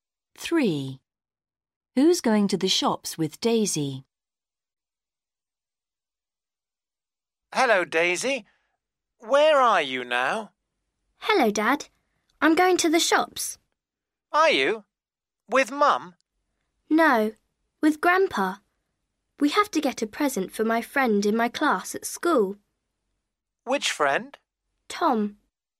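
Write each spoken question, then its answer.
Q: Who's going to the shops with Daisy?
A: Grandpa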